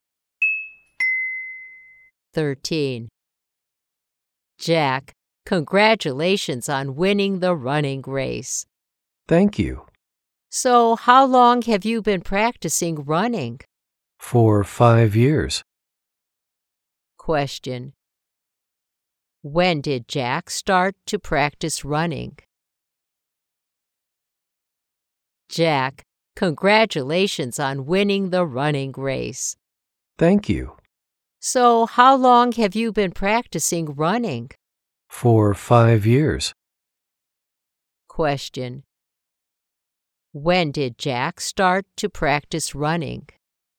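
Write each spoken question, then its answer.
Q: When did Jack start to practice running?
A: Five years ago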